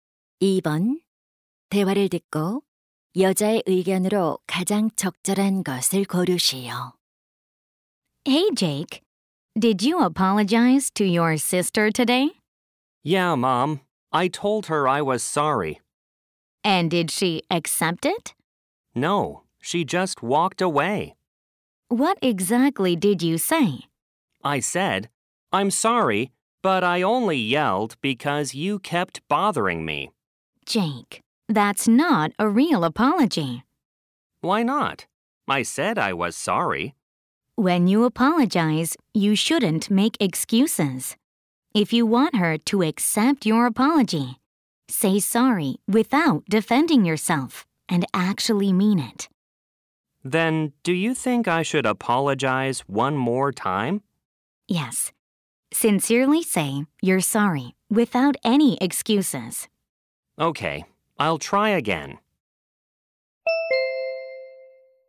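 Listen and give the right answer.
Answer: 사과할 때는 변명하지 말고 진심으로 해야 한다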